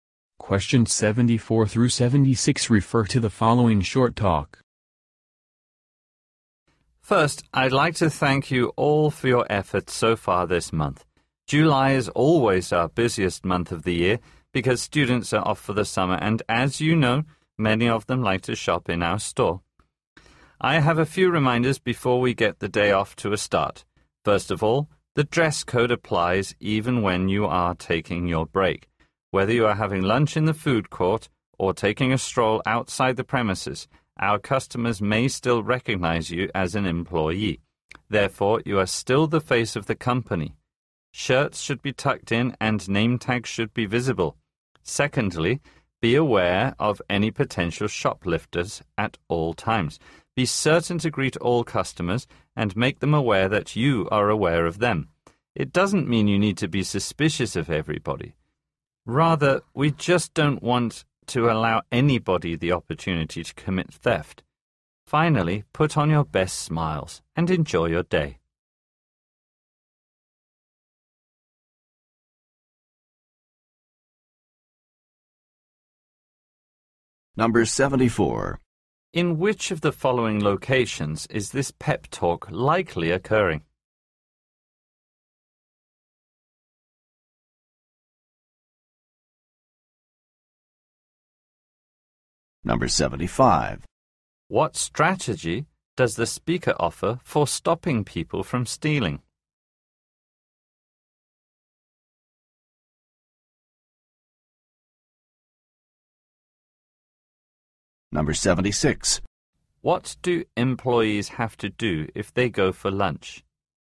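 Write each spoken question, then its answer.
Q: In which of the following locations is this pep talk likely occurring?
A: In a store

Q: What strategy does the speaker offer for stopping people from stealing?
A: Greet all customers so they know staff are aware of them

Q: What do employees have to do if they go for lunch?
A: Follow the dress code (shirts tucked in, name tags visible)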